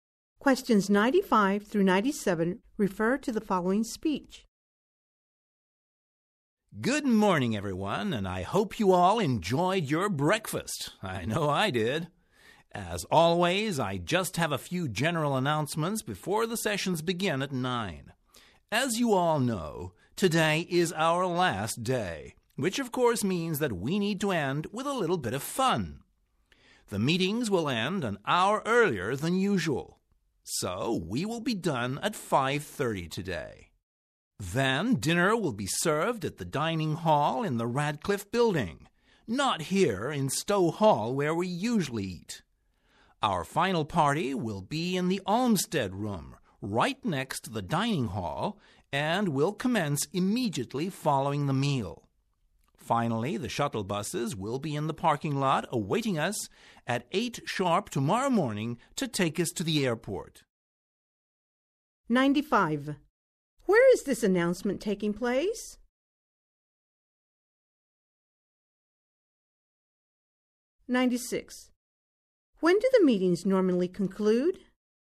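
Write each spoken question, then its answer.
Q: When do the meetings normally conclude?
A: At 6:30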